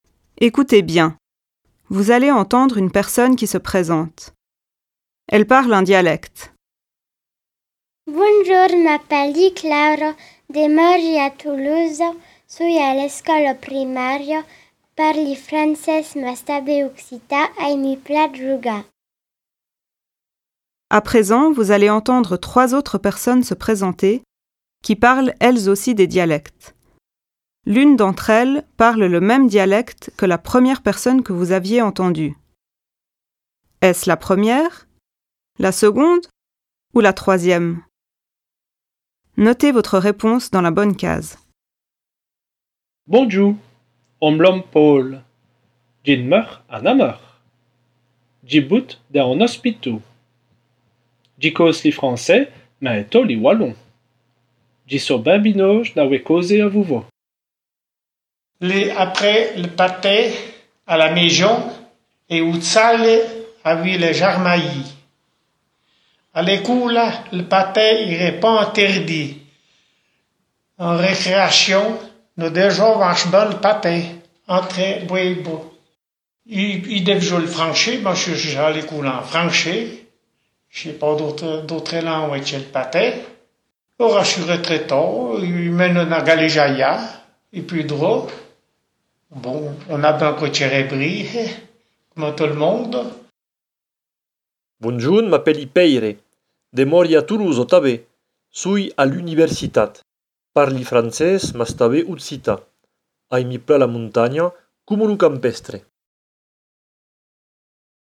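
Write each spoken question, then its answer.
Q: Est-ce la première, la seconde ou la troisième?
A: la troisième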